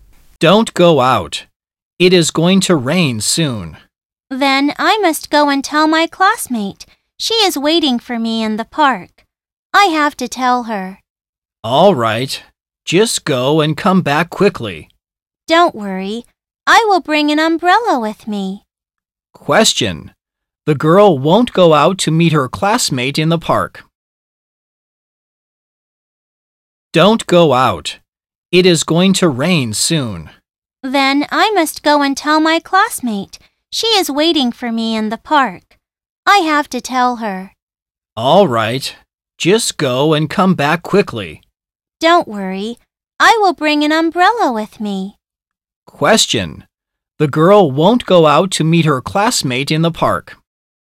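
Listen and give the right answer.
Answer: B: false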